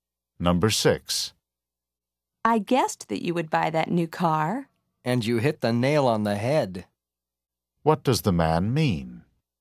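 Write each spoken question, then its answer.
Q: What does the man mean?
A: The guess was exactly right.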